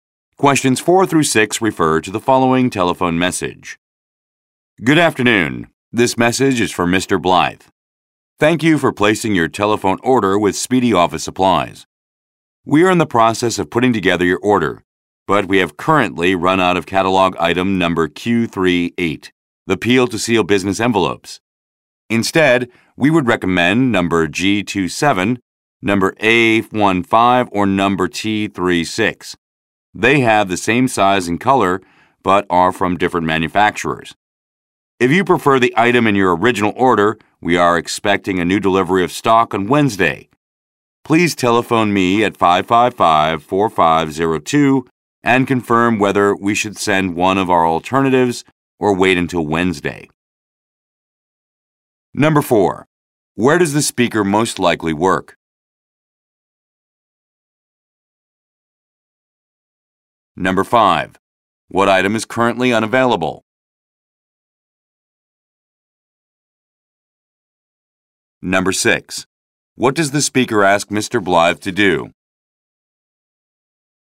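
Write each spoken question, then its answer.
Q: Where does the speaker most likely work?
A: At an office supply store (Speedy Office Supplies)

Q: What item is currently unavailable?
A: Peel-to-seal business envelopes (item Q38)

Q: What does the speaker ask Mr. Blythe to do?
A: Call back to say whether to send an alternative or wait until Wednesday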